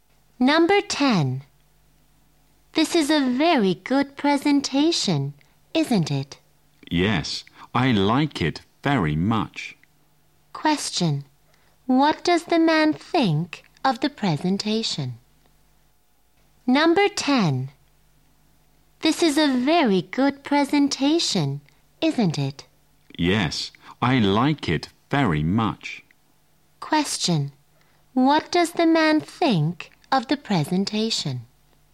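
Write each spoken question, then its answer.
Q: What does the man think of the presentation?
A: It is very good; he likes it very much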